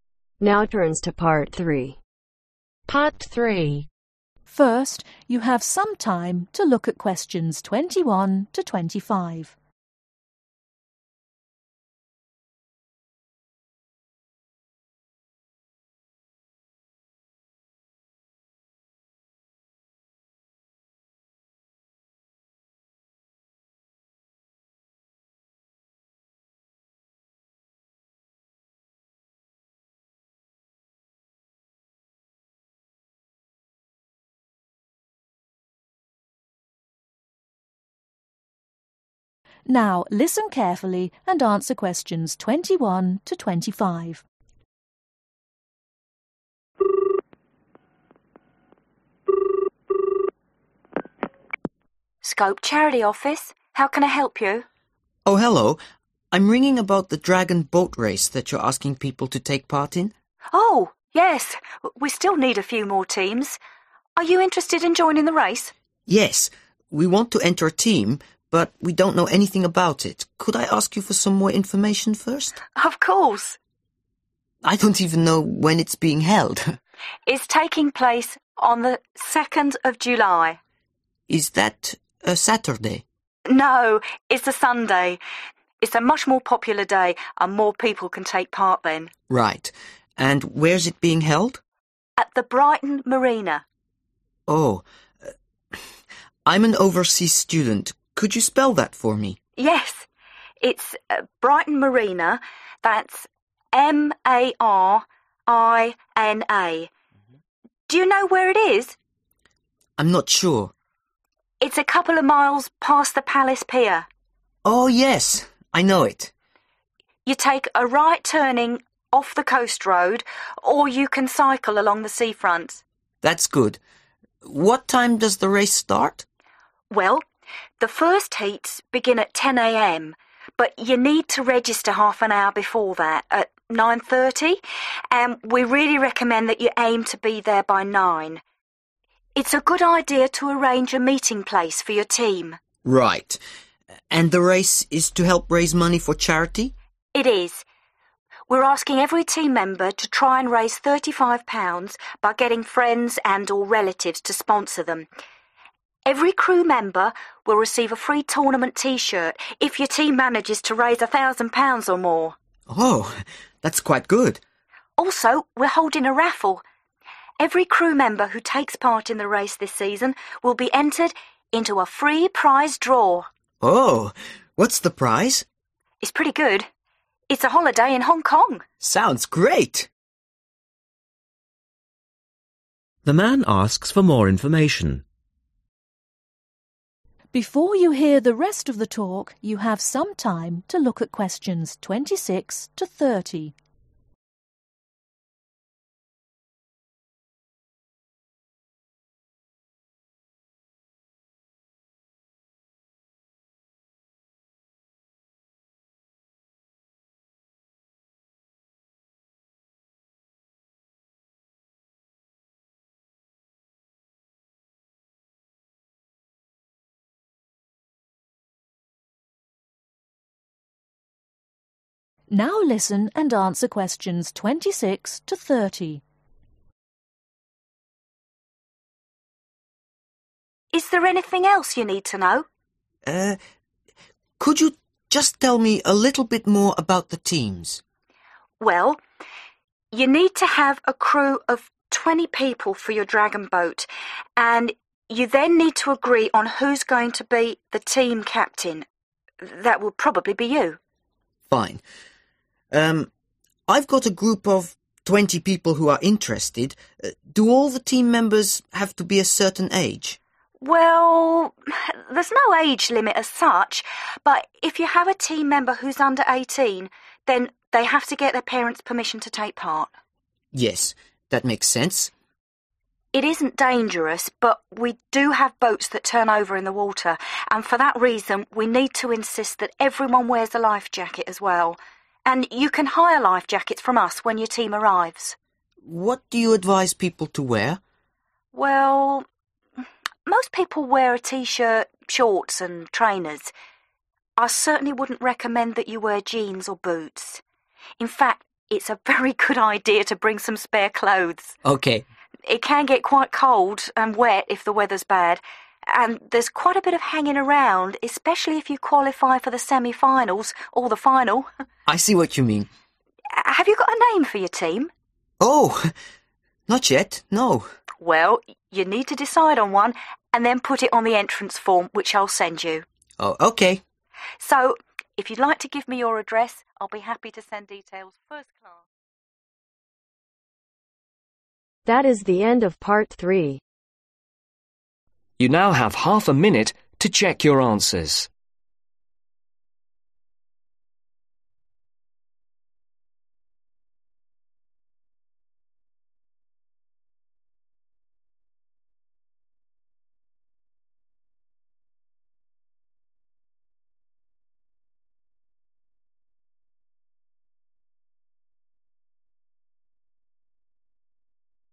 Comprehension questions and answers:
Complete the information below. Write NO MORE THAN TWO WORDS OR A NUMBER for each answer.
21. Day & date: Sunday (21) ..............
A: 2ND JULY

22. Place: Brigton (22) .............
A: MARINA

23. Registration time: (23) .............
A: 9.30

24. -aim to raise over (24) ............... as a team and get a free t-shirt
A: 1000

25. -free Prize Draw for trip to (25) ..............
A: HONG KONG

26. -must have crew of 20 and elect a (26) ..............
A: TEAM CAPTAIN

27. -under 18s need to have (27) ............. to enter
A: PARENTS PERMISSION

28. – need to hire 20 (28) ...............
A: LIFE JACKETS

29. -advised to bring extra (29) ..............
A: CLOTHES/CLOTHING

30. -must choose a (30) ............. for the team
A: NAME